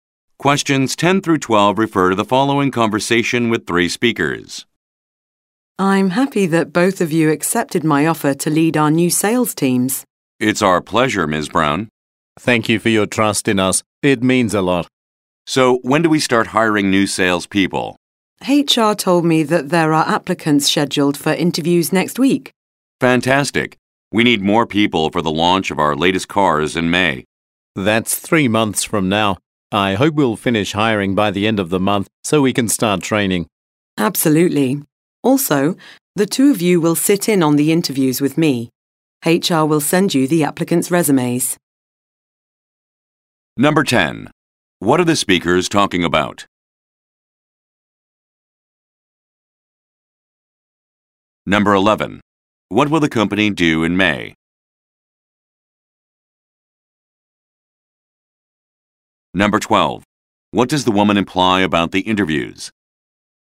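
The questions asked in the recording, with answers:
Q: What are the speakers talking about?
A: Hiring new salespeople for their new sales teams

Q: What will the company do in May?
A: Launch its latest cars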